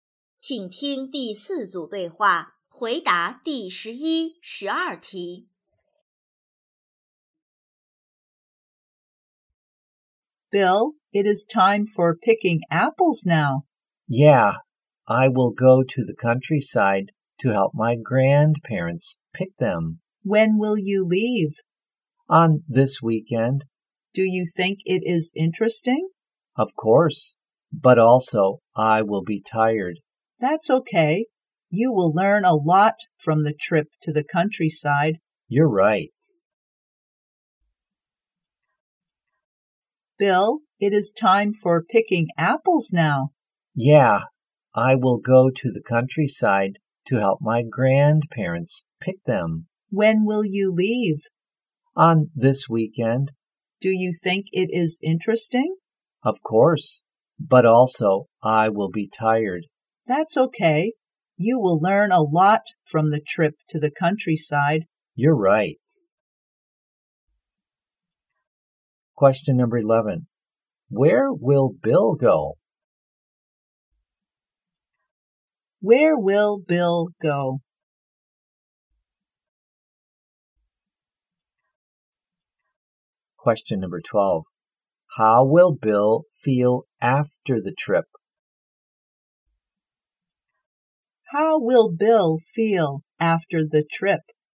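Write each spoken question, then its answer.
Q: Where will Bill go?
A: To the countryside

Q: How will Bill feel after the trip?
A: Tired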